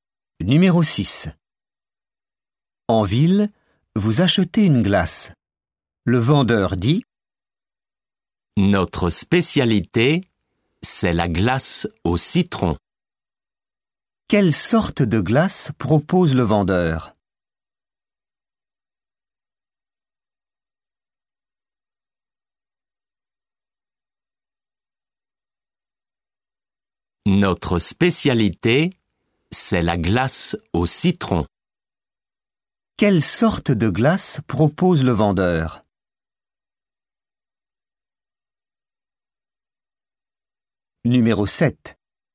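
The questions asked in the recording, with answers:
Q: Quelle sorte de glace propose le vendeur ?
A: la glace au citron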